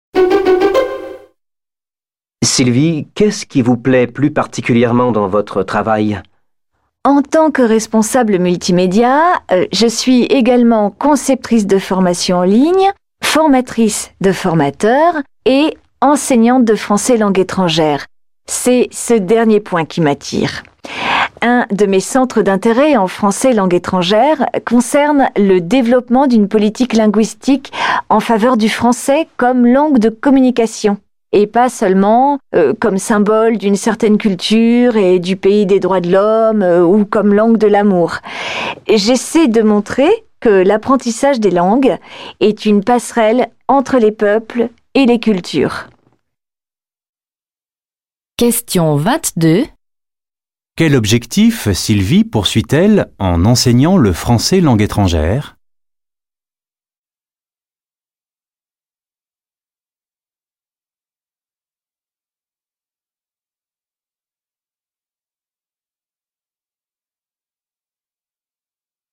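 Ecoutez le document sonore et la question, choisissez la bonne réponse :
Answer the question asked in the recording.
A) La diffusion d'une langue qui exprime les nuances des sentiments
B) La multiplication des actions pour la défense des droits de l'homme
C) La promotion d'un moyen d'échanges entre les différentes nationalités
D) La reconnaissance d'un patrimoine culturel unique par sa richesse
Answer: C) La promotion d'un moyen d'échanges entre les différentes nationalités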